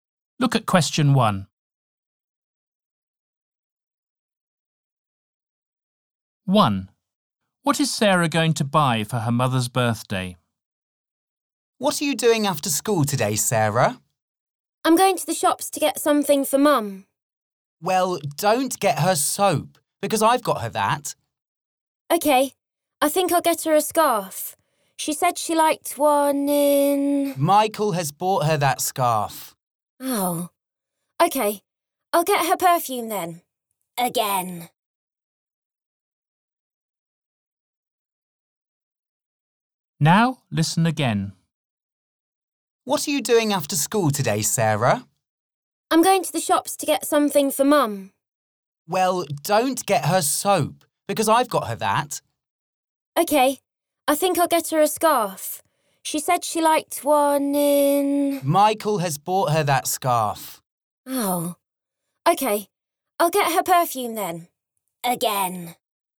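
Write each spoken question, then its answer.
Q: What is Sarah going to buy for her mother's birthday?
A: perfume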